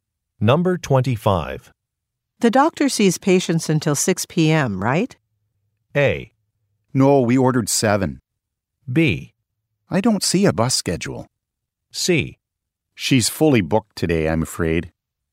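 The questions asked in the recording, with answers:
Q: The doctor sees patients until 6 p.m., right?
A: C: She's fully booked today, I'm afraid.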